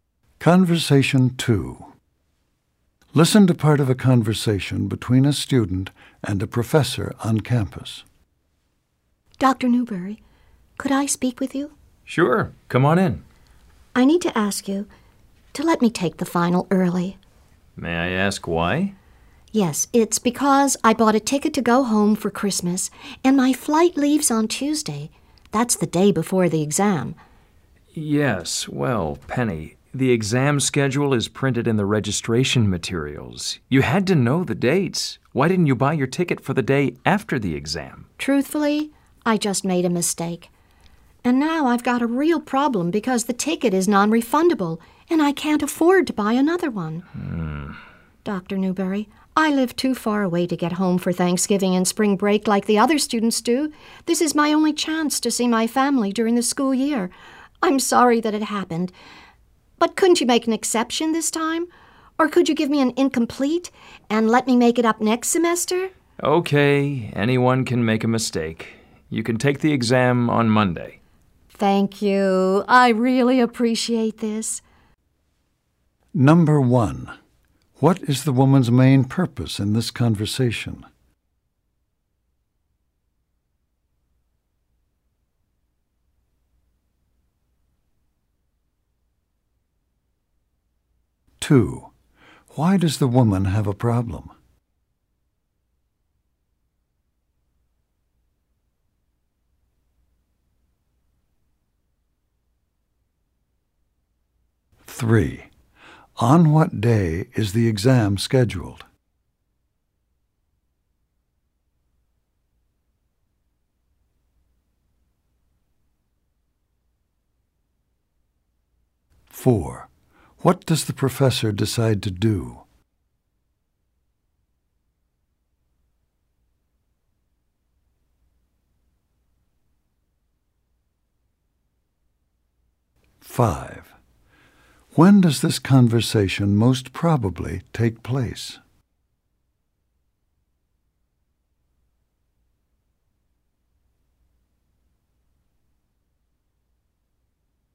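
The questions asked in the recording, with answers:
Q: What is the woman's main purpose in this conversation?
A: To ask to take the final exam early

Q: Why does the woman have a problem?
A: She bought a non-refundable ticket for a flight before the exam

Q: On what day is the exam scheduled?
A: Wednesday

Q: What does the professor decide to do?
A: Let her take the exam on Monday

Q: When does this conversation most probably take place?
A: Near the end of the fall semester, before Christmas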